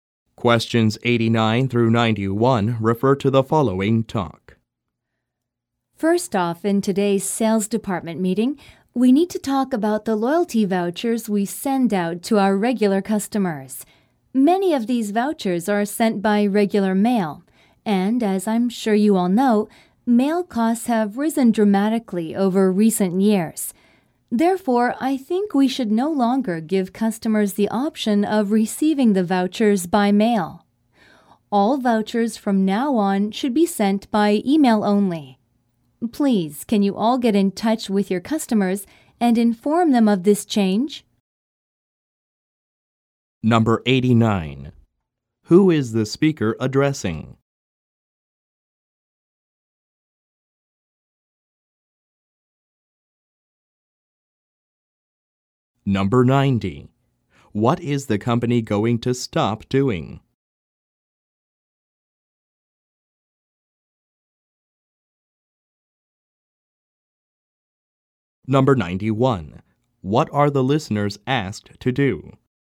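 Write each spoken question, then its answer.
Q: Who is the speaker addressing?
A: The sales department staff

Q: What is the company going to stop doing?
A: Sending loyalty vouchers by regular mail

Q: What are the listeners asked to do?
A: Contact their customers and tell them about the change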